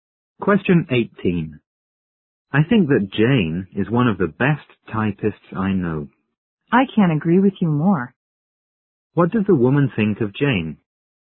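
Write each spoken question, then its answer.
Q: What does the woman think of Jane?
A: She is one of the best typists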